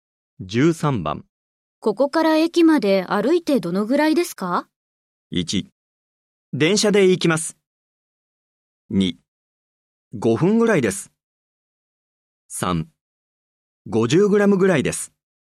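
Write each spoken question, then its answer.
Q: ここから駅まで歩いてどのぐらいですか?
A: 2: 5分ぐらいです。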